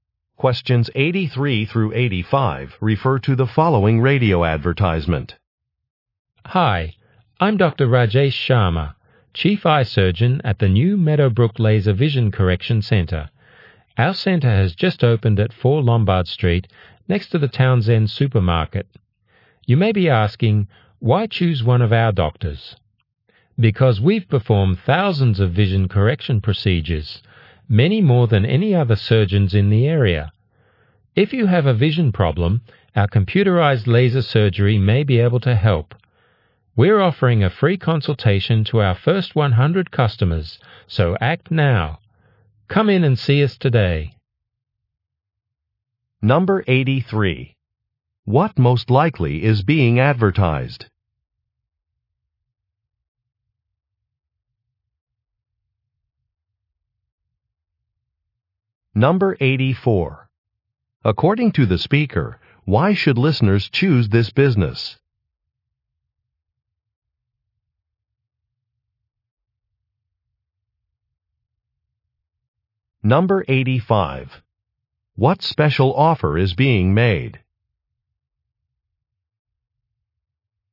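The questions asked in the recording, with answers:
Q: What most likely is being advertised?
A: A laser vision correction center

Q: According to the speaker, why should listeners choose this business?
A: Its doctors have performed more procedures than others in the area

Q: What special offer is being made?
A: A free consultation for the first 100 customers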